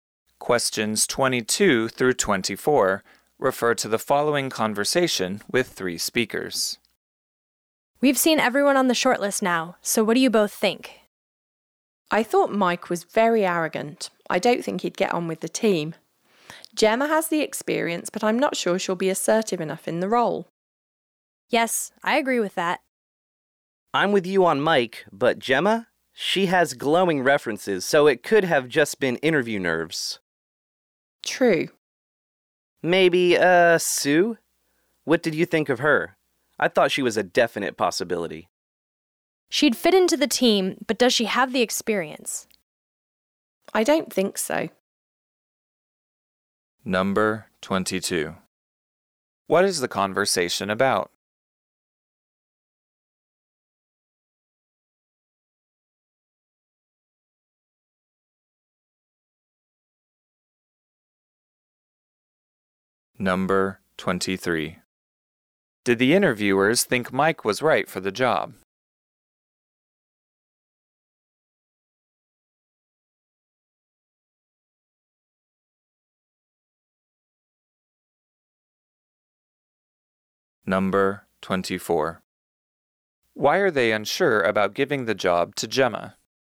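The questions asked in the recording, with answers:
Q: What is the conversation about?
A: Choosing which shortlisted candidate to hire after job interviews

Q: Did the interviewers think Mike was right for the job?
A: No, they thought he was arrogant and wouldn't get on with the team

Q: Why are they unsure about giving the job to Gemma?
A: They are not sure she would be assertive enough in the role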